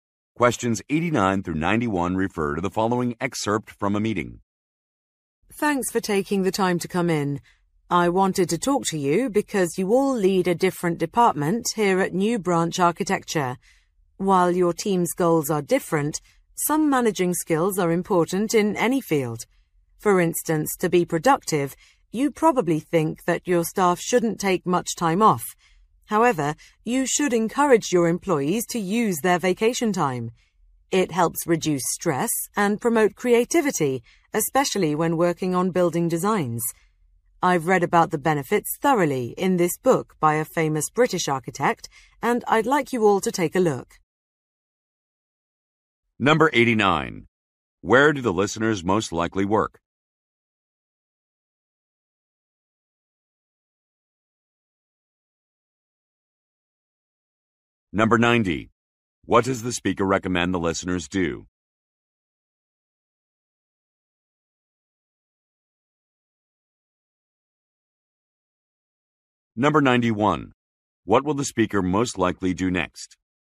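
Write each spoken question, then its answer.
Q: Where do the listeners most likely work?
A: At an architecture firm

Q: What does the speaker recommend the listeners do?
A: Encourage employees to use their vacation time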